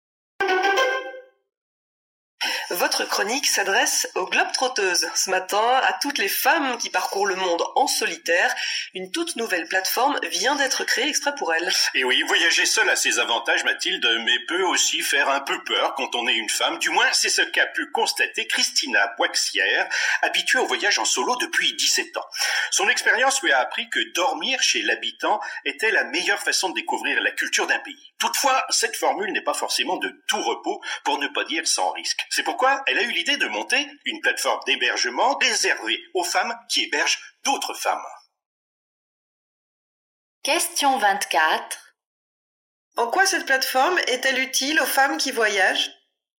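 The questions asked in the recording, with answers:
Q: En quoi cette plateforme est-elle utile aux femmes qui voyagent?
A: Elle leur permet de loger en sécurité chez d'autres femmes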